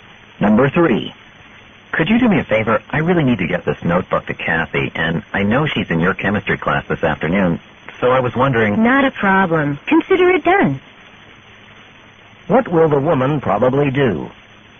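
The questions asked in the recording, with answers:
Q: What will the woman probably do?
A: Take the notebook to Kathy in chemistry class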